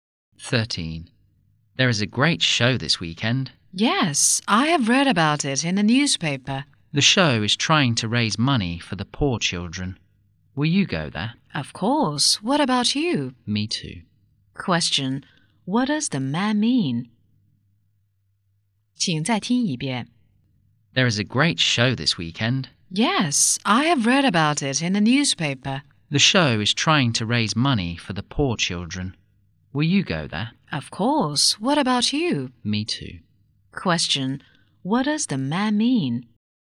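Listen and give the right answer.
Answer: He will go to the show too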